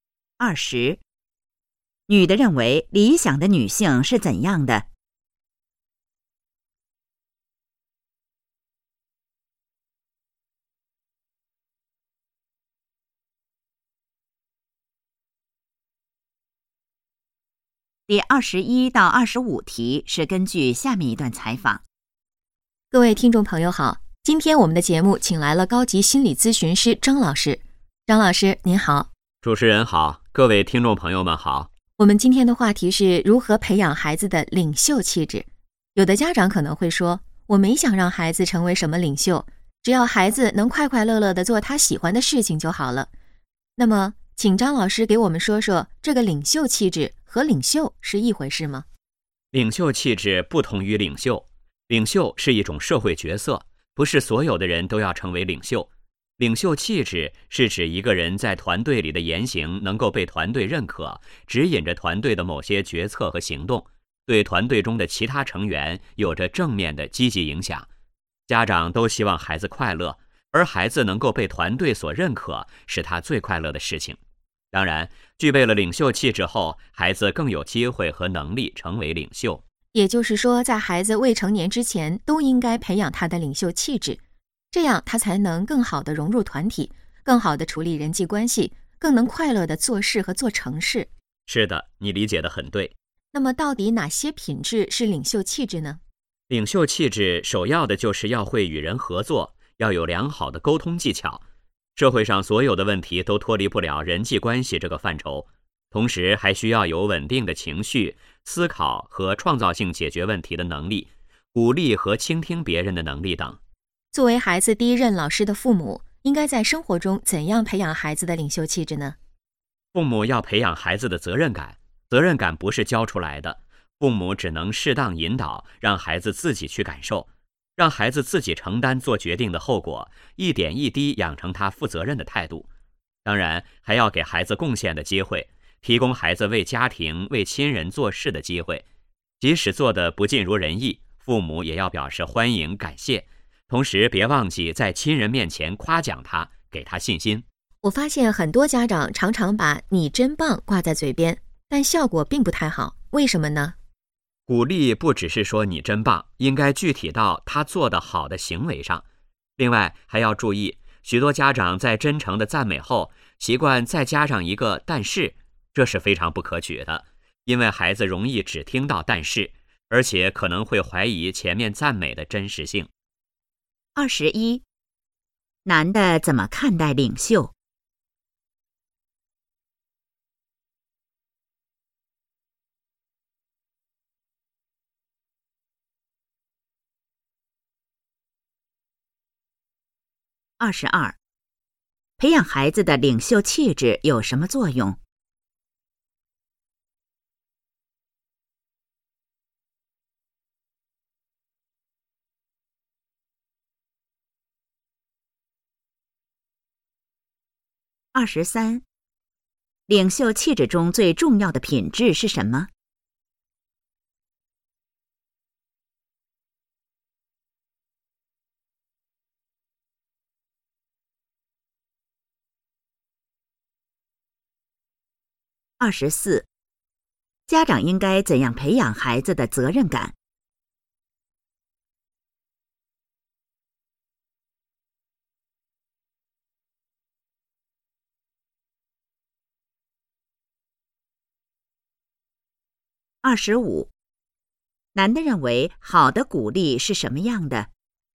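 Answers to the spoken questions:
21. 领袖是一种社会角色,不是所有人都要成为领袖
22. 能更好地融入团体、处理人际关系
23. 会与人合作,有良好的沟通技巧
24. 适当引导,让孩子自己承担做决定的后果
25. 具体到孩子做得好的行为上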